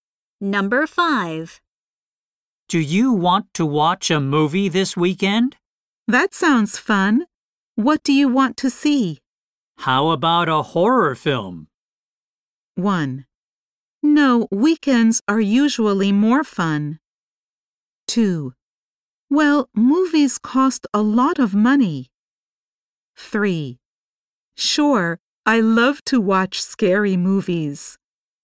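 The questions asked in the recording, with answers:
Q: How about a horror film?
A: 3: Sure, I love to watch scary movies.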